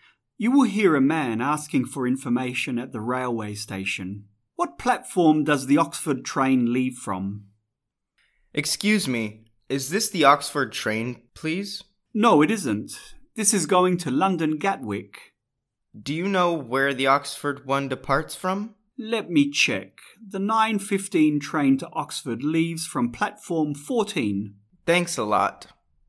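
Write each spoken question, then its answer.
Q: What platform does the Oxford train leave from?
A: Platform 14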